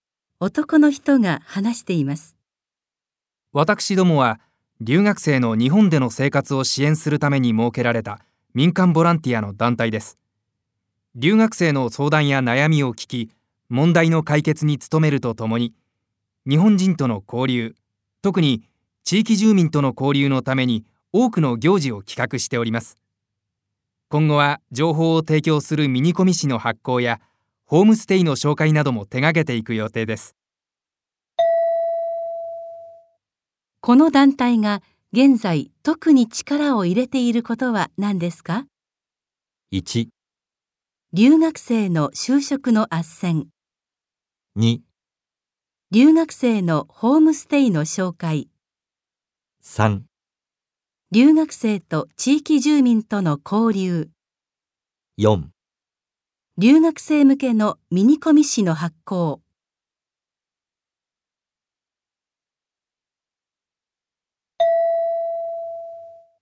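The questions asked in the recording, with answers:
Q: この団体が現在特に力を入れていることは何ですか?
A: 3: 留学生と地域住民との交流。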